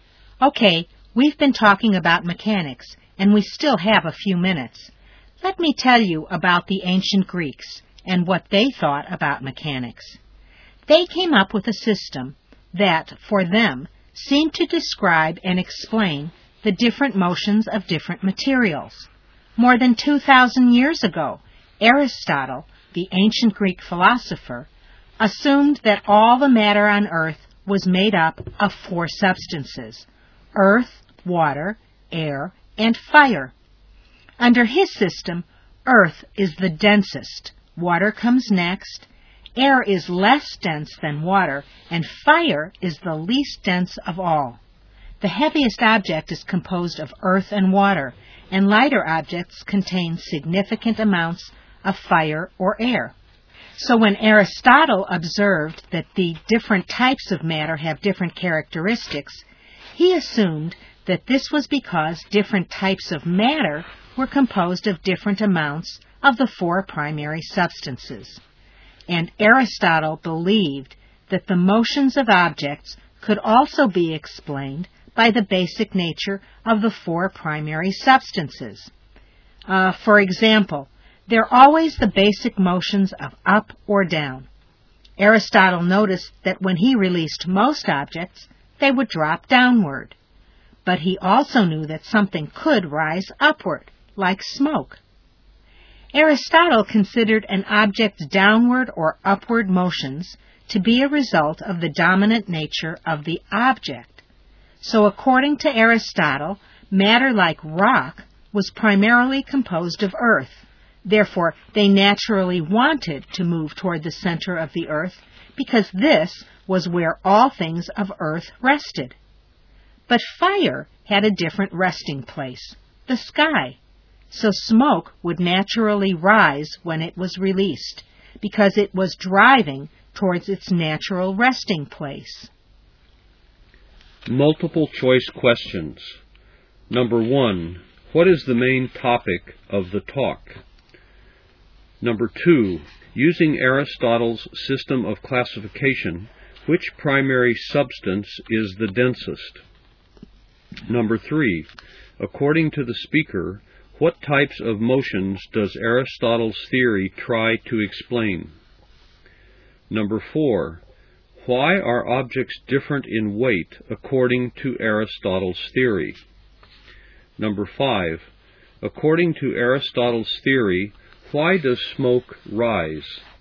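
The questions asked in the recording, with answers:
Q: what is the main topic of the talk?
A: Aristotle's ancient Greek theory of mechanics (matter and motion)

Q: using Aristotle's system of classification, which primary substance is the densest?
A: Earth

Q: according to the speaker, what types of motions does Aristotle's theory try to explain?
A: The basic motions of up and down

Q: why are objects different in weight according to Aristotle's theory?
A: They are made of different amounts of the four primary substances

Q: according to Aristotle's theory, why does smoke rise?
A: It moves toward its natural resting place, the sky, because it is mostly fire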